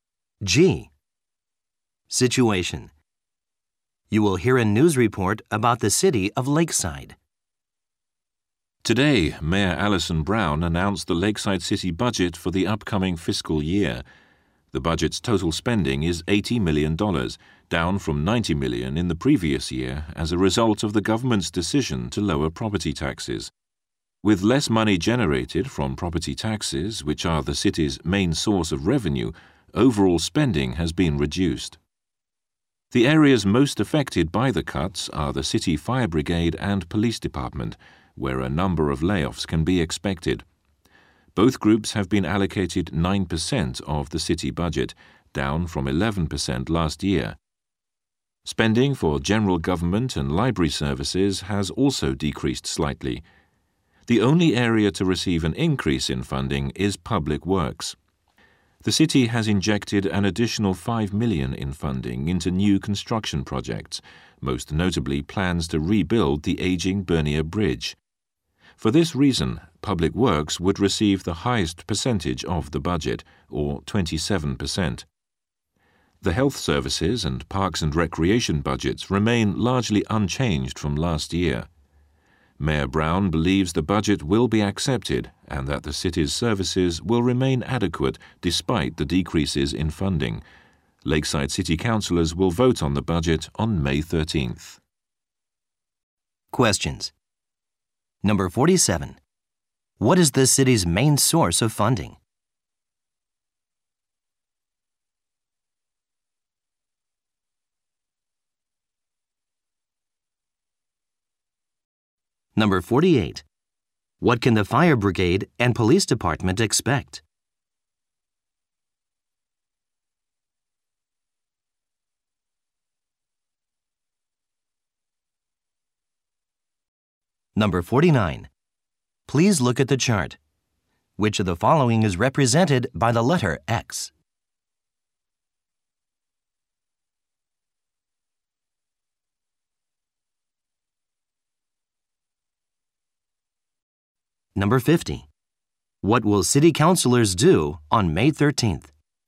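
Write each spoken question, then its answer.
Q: What is the city's main source of funding?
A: Property taxes

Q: What can the fire brigade and police department expect?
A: Layoffs

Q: What will city councilors do on May 13th?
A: Vote on the budget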